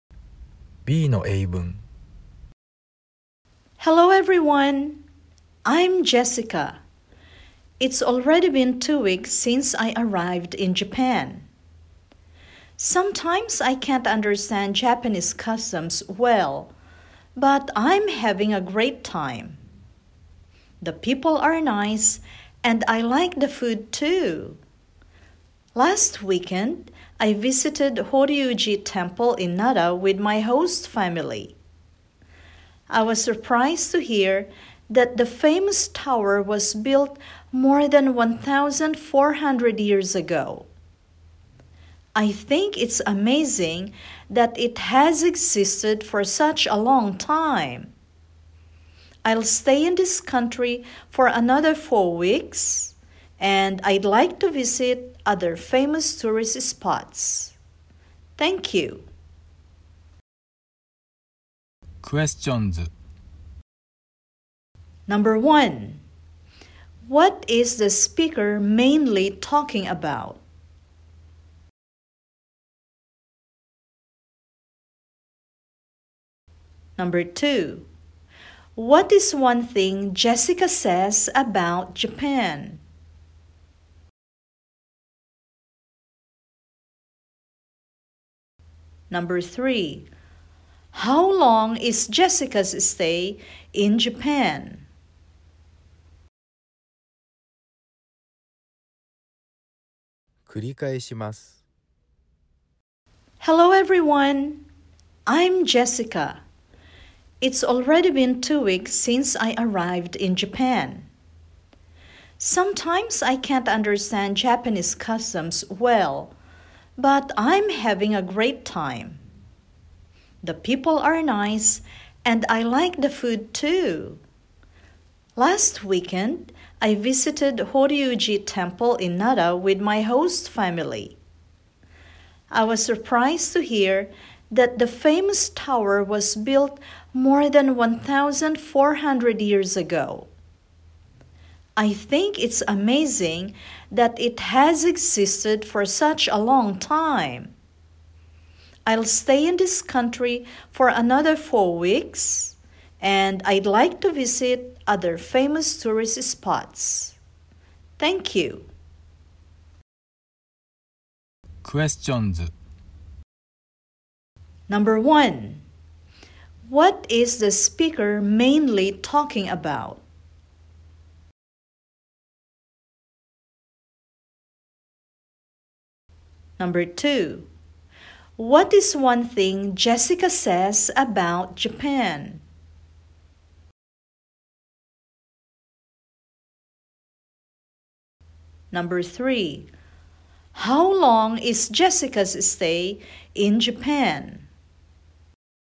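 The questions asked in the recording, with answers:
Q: what is one thing Jessica says about Japan?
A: The people are nice and she likes the food

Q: how long is Jessica's stay in Japan?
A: 6 weeks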